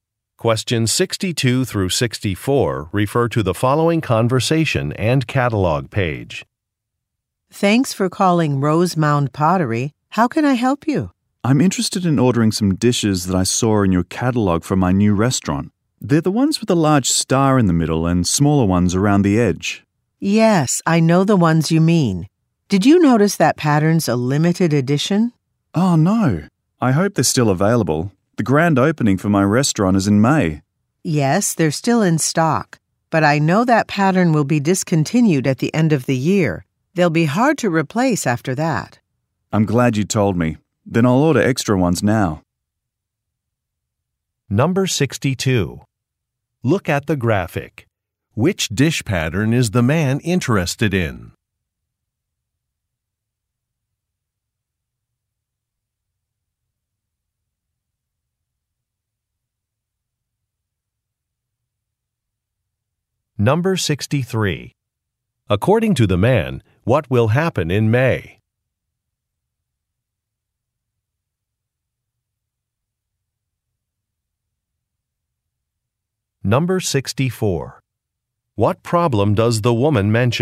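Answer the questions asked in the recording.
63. His restaurant will have its grand opening.
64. The pattern will be discontinued at the end of the year.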